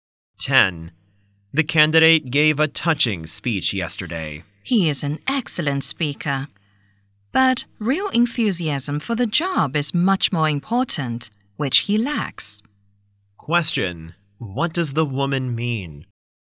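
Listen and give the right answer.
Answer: The candidate lacks real enthusiasm for the job.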